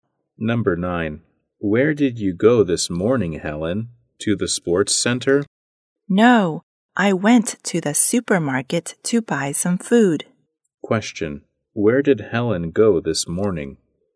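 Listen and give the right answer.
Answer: To the supermarket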